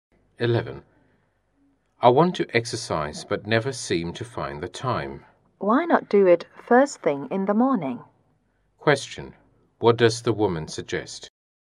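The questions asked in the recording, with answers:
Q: What does the woman suggest?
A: Exercise first thing in the morning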